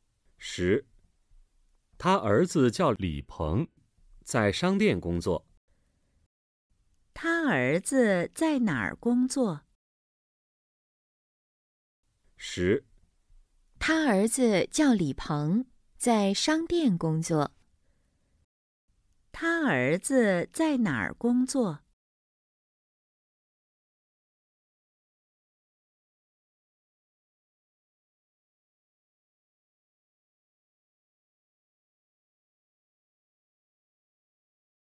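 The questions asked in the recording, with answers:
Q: 他儿子在哪儿工作?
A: 在商店工作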